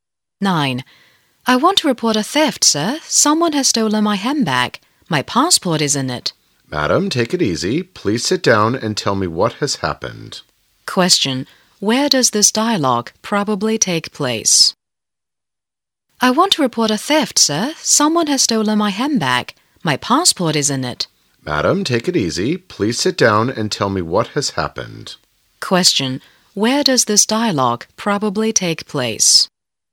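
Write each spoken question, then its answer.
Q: Where does this dialogue probably take place?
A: At a police station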